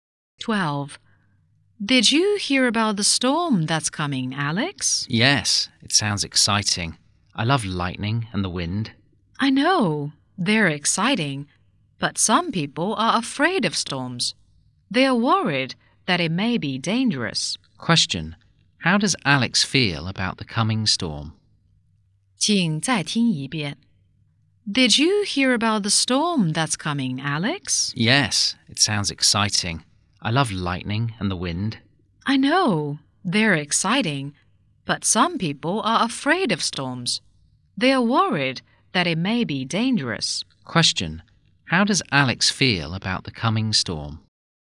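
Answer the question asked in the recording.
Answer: Excited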